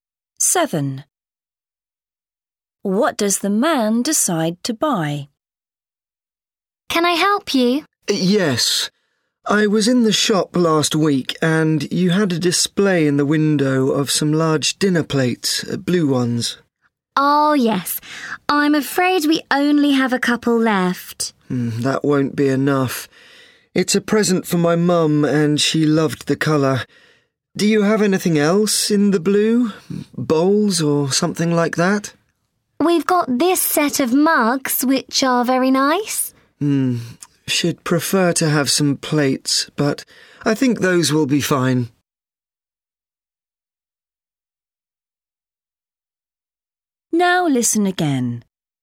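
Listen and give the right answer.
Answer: A set of blue mugs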